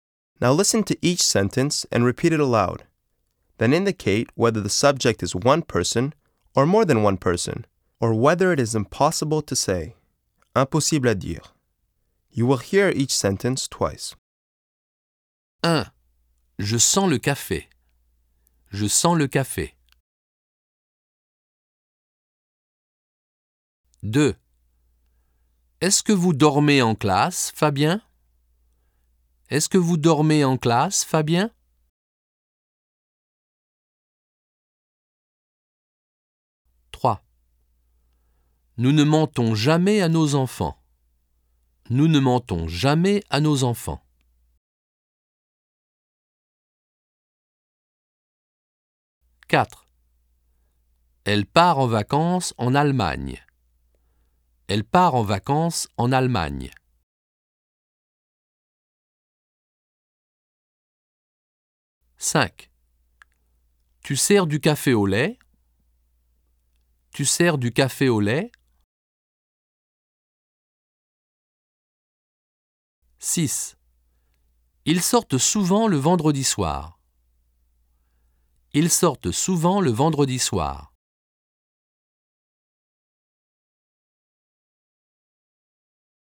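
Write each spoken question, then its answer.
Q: Je sens le café.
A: one person

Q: Est-ce que vous dormez en classe, Fabien?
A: one person

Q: Nous ne mentons jamais à nos enfants.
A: more than one person

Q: Elle part en vacances en Allemagne.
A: one person

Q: Tu sers du café au lait?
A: one person

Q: Ils sortent souvent le vendredi soir.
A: more than one person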